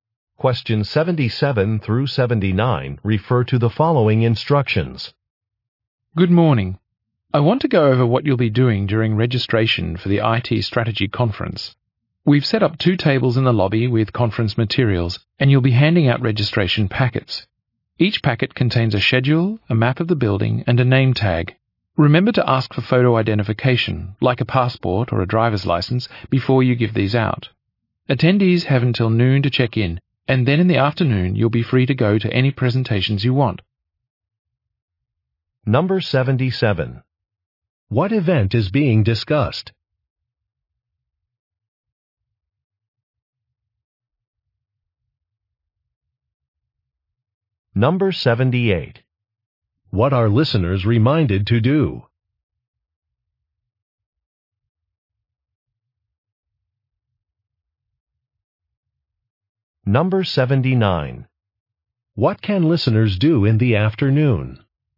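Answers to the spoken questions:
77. An IT strategy conference
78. Ask for photo identification
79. Attend any presentations they want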